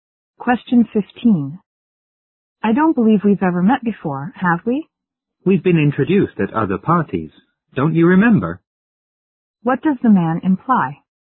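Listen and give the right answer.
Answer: They have met before at other parties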